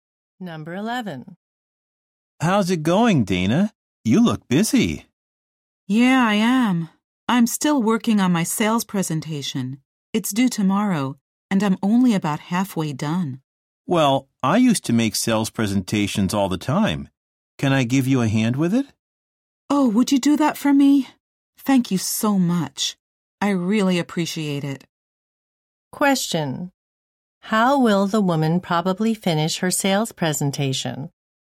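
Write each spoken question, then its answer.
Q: How will the woman probably finish her sales presentation?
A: With help from the man.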